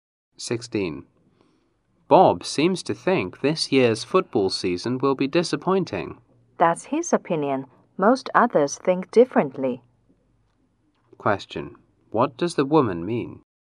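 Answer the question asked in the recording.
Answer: Most people don't think the season will be disappointing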